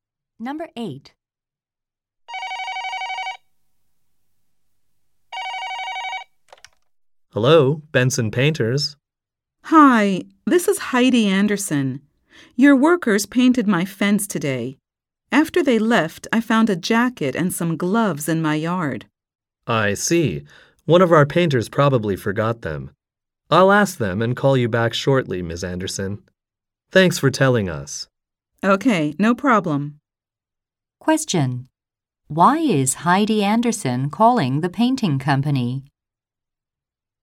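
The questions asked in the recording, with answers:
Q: Why is Heidi Anderson calling the painting company?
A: The workers left a jacket and gloves in her yard.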